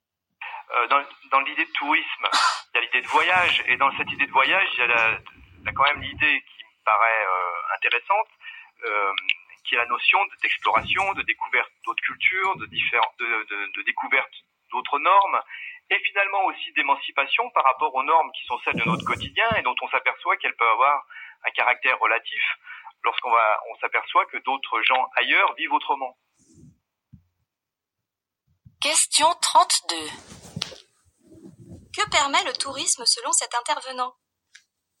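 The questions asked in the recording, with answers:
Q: Que permet le tourisme selon cet intervenant?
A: Découvrir d'autres cultures et s'émanciper de ses normes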